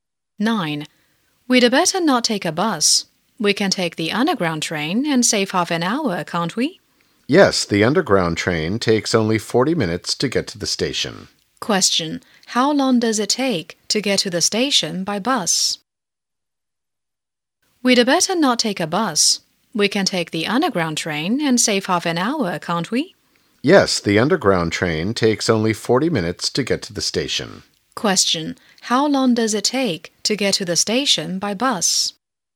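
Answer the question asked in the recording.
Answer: 70 minutes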